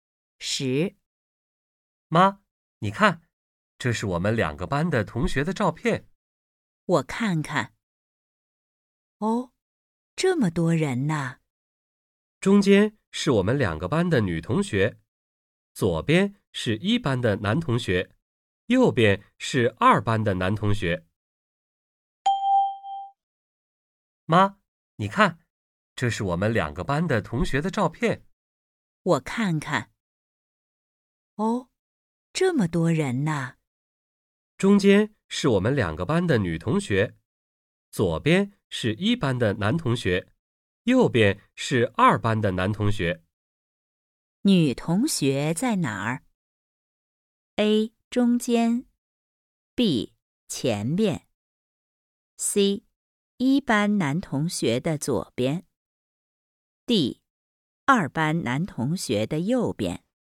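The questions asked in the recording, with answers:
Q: 女同学在哪儿?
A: A: 中间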